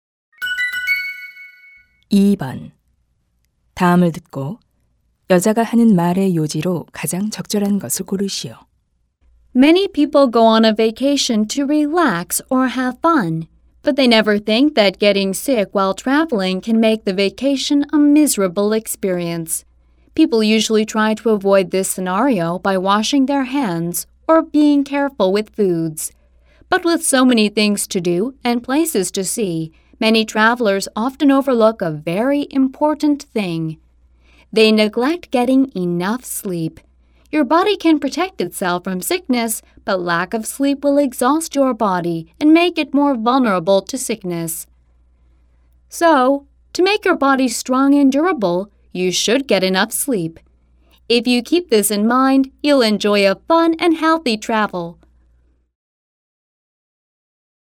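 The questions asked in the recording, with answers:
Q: 다음을 듣고 여자가 하는 말의 요지로 가장 적절한 것을 고르시오.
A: 여행 중 병에 걸리지 않으려면 충분히 자야 한다.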